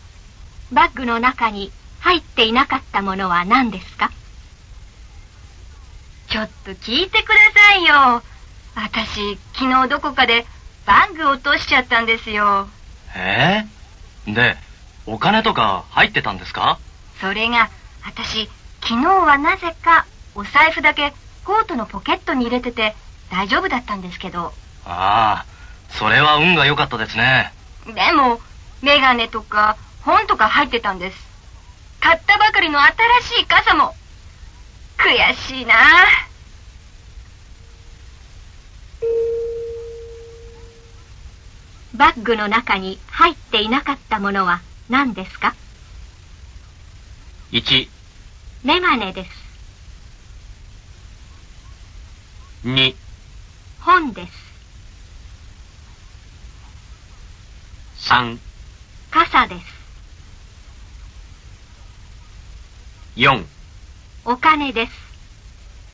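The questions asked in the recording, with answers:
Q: バッグの中に入っていなかったものは何ですか?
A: 4: お金です。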